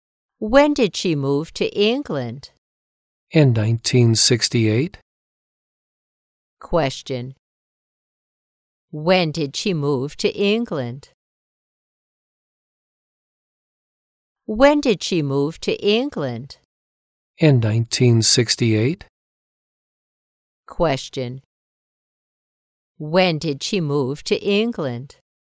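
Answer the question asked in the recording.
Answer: In 1968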